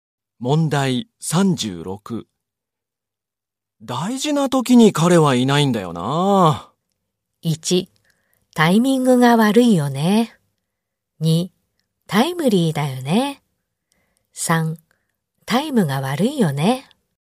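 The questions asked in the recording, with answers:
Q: 大事な時に彼はいないんだよな。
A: 1: タイミングが悪いよね。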